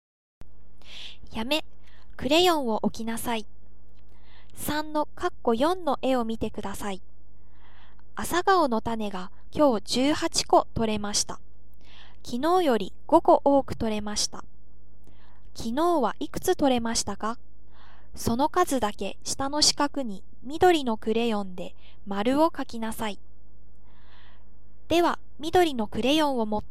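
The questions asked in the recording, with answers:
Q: 昨日はいくつ取れましたか?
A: 13個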